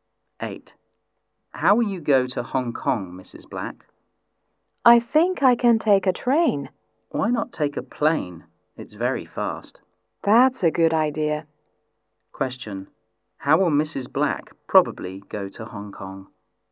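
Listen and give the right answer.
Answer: By plane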